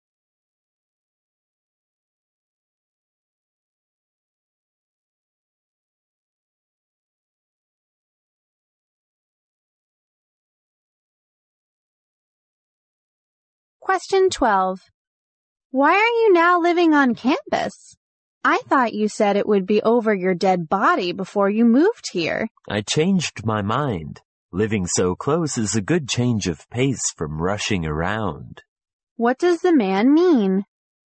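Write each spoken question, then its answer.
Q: What does the man mean?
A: He likes living on campus because it saves him rushing around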